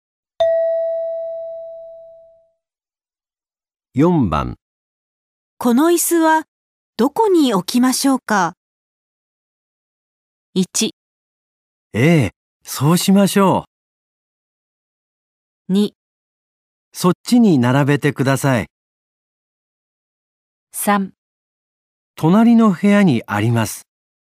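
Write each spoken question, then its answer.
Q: どこに置きましょうか。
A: 2: そっちに並べてください。

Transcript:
1
ええ、そうしましょう。
2
そっちに並べてください。
3
隣の部屋にあります。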